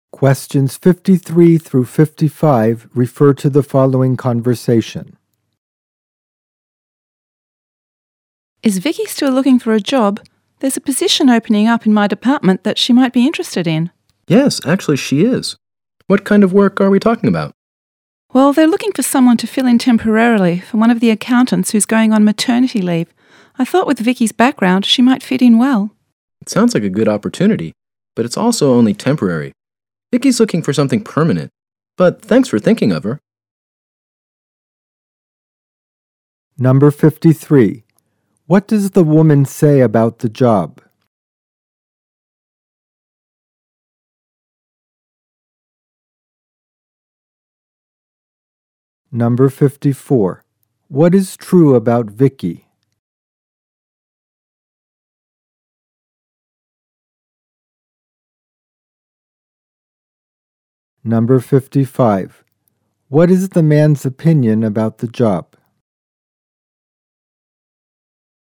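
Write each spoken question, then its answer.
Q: What is true about Vicky?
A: She is looking for a permanent job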